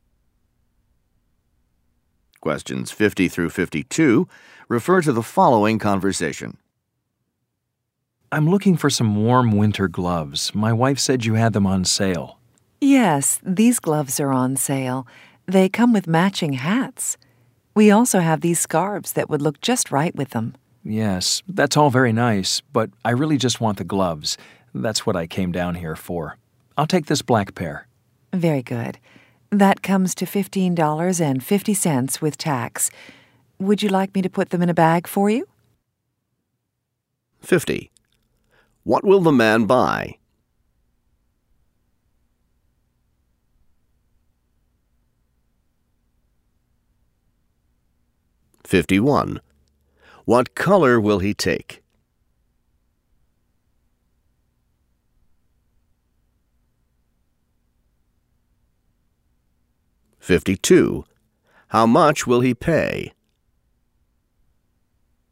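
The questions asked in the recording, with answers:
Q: What will the man buy?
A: Gloves

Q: What color will he take?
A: Black

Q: How much will he pay?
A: $15.50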